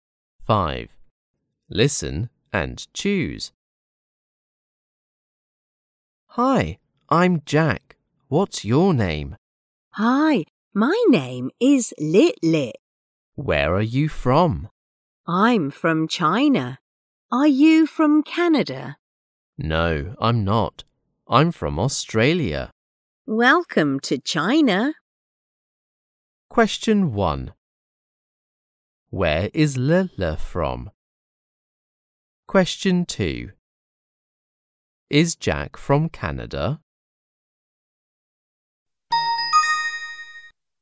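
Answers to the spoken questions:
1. China
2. No, he isn't. He is from Australia.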